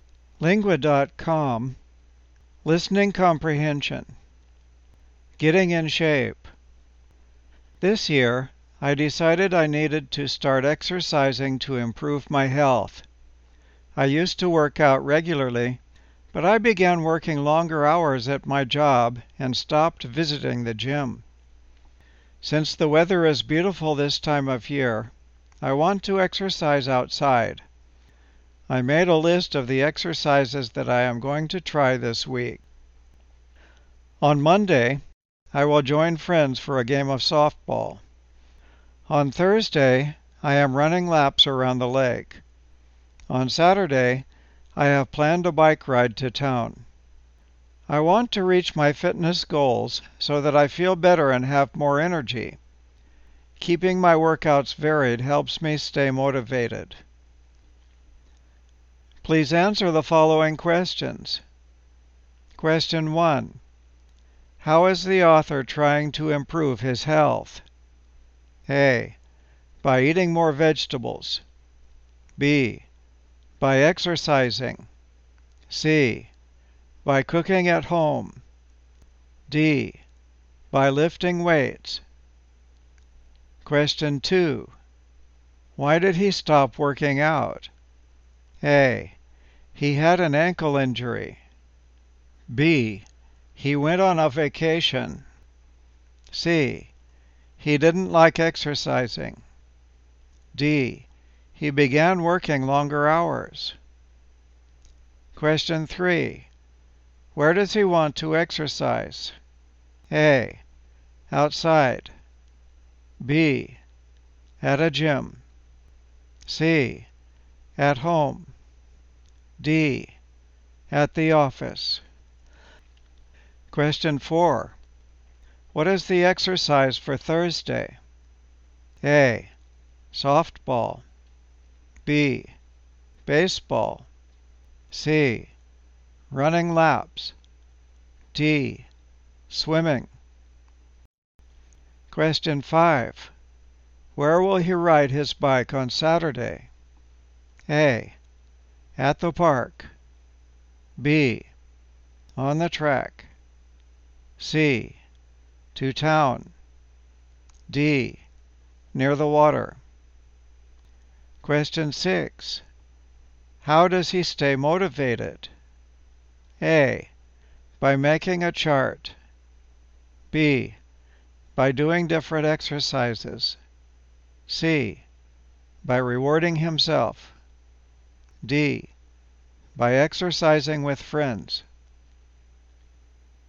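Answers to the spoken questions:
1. B: By exercising.
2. D: He began working longer hours.
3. A: Outside.
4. C: Running laps.
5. C: To town.
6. B: By doing different exercises.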